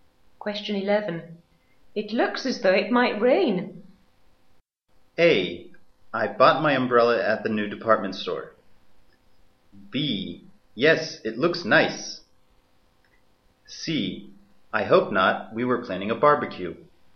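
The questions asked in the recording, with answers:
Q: It looks as though it might rain.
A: C: I hope not. We were planning a barbecue.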